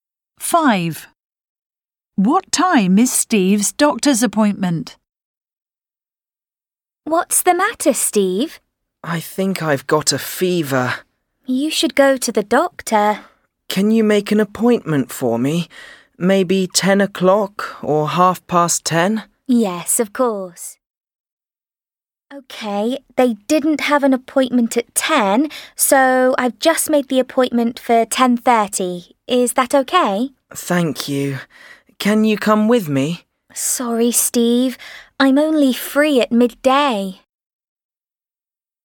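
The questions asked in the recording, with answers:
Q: What time is Steve's doctor's appointment?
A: 10:30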